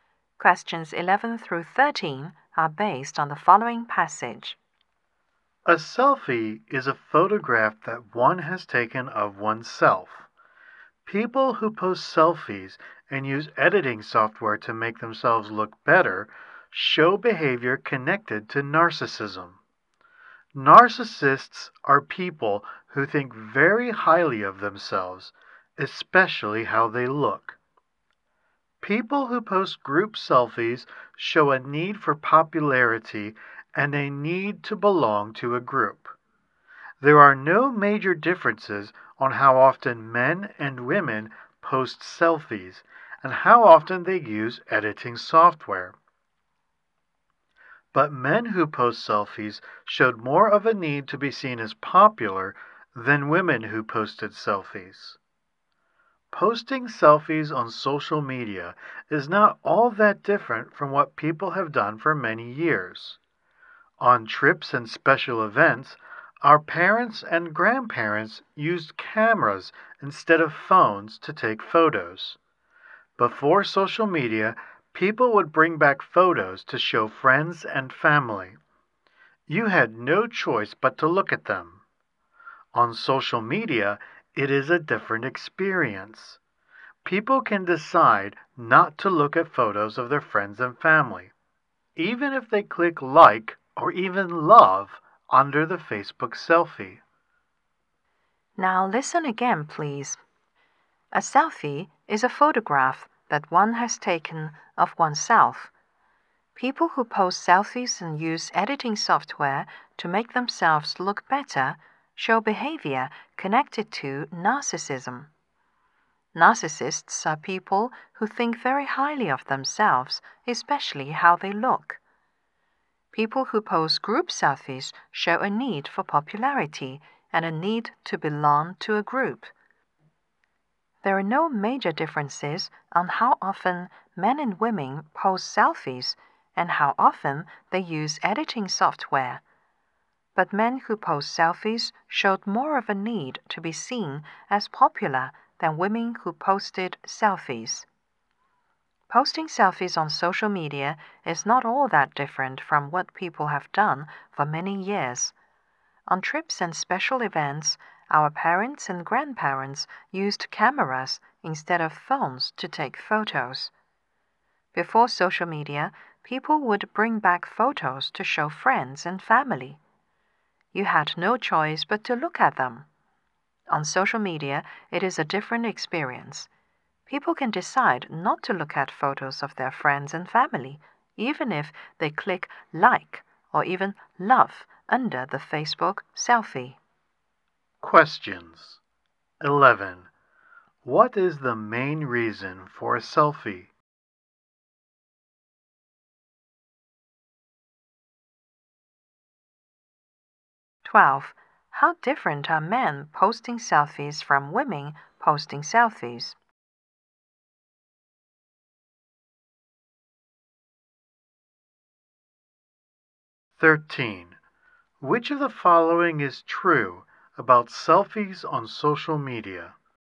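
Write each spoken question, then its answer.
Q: How different are men posting selfies from women posting selfies?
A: Men show more need to be seen as popular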